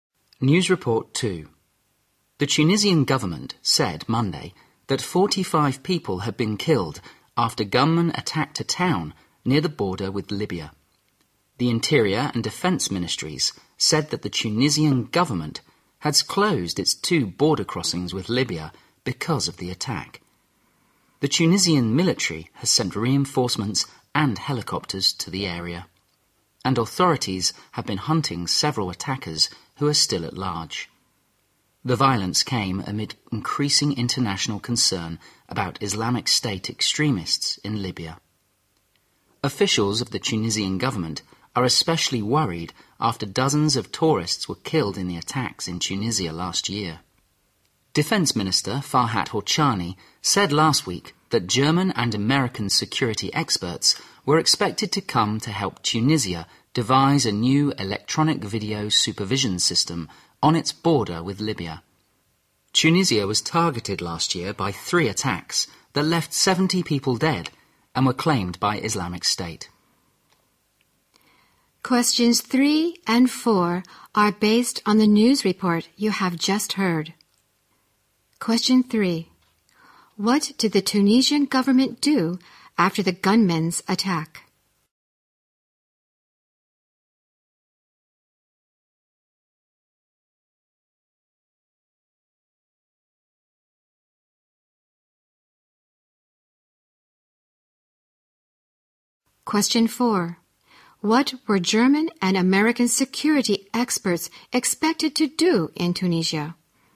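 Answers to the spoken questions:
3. It closed its two border crossings with Libya
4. Help devise a new electronic video supervision system on the border with Libya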